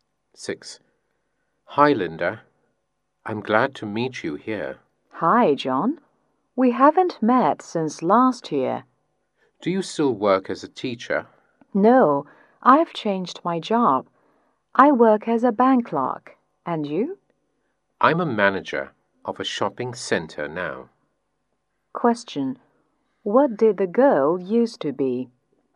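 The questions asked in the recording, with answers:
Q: What did the girl used to be?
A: A teacher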